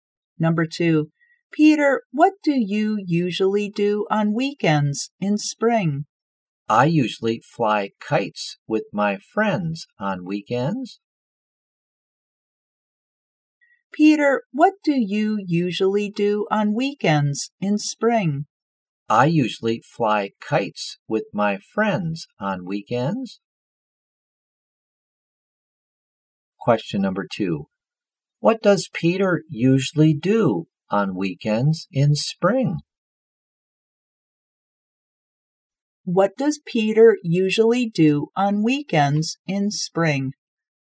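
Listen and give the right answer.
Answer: He flies kites with his friends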